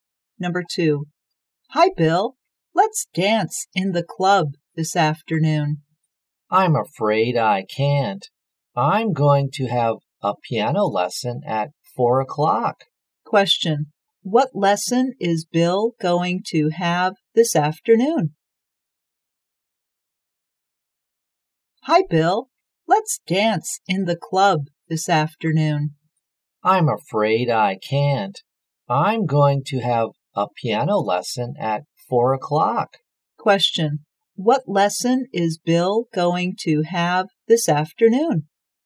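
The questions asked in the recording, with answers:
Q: What lesson is Bill going to have this afternoon?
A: A piano lesson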